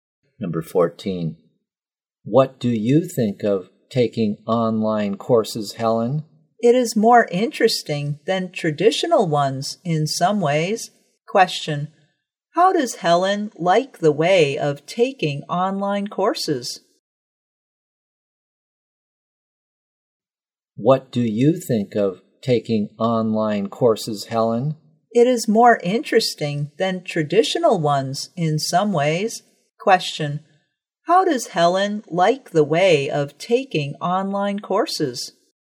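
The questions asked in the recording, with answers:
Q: How does Helen like the way of taking online courses?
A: It is more interesting than traditional ones in some ways.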